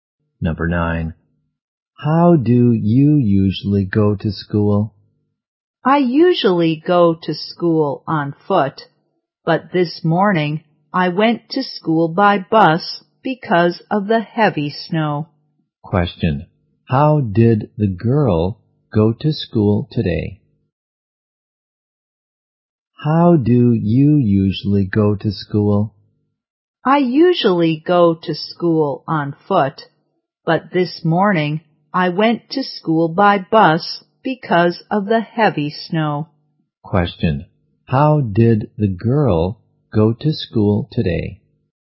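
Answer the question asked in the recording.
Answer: By bus.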